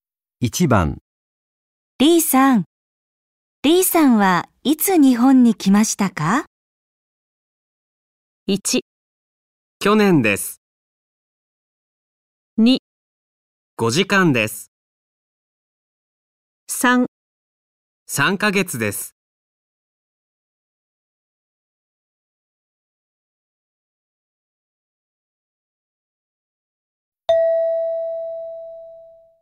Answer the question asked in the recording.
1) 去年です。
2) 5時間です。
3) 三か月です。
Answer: 1) 去年です。

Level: N5 Listening · Test 1